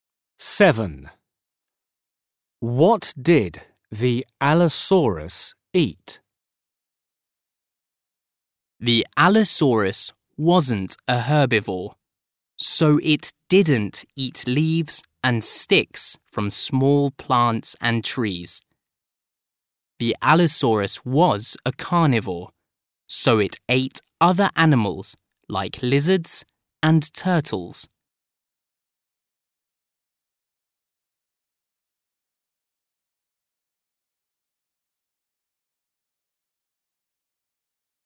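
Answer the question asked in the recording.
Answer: other animals like lizards and turtles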